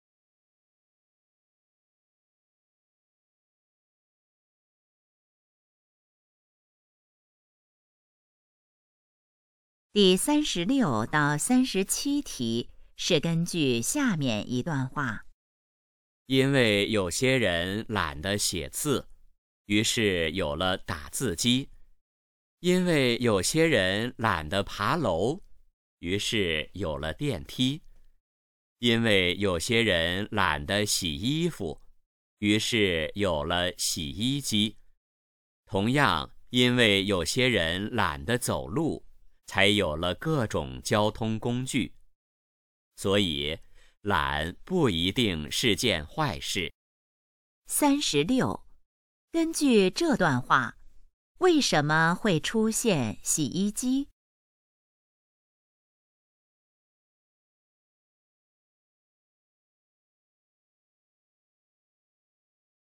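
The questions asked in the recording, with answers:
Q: 根据这段话,为什么会出现洗衣机?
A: 有些人懒得洗衣服

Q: 这段话主要想告诉我们什么?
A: 懒不一定是坏事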